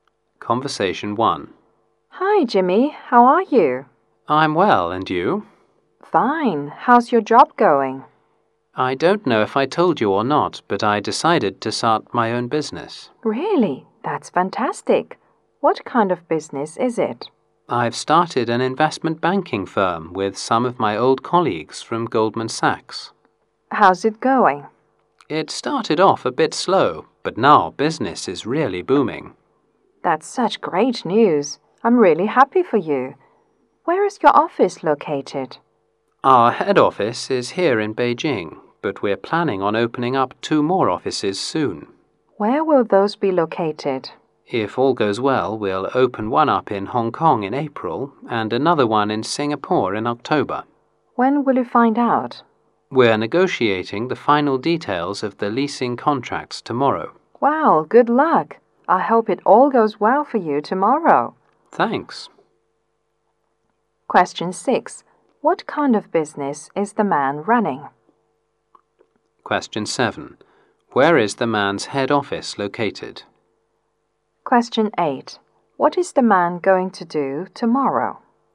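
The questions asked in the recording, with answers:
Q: Question 6. What kind of business is the man running?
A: An investment banking firm

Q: Question 7. Where is the man's head office located?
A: In Beijing

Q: Question 8. What is the man going to do tomorrow?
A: Negotiate the final details of the leasing contracts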